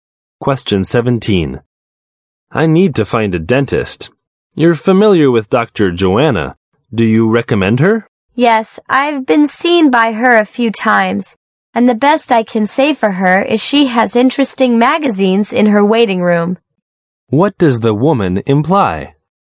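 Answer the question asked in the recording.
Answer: She doesn't recommend Dr. Joanna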